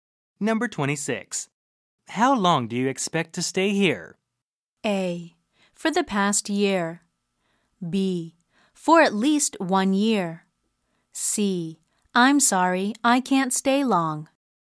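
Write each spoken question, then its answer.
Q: How long do you expect to stay here?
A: B: For at least 1 year.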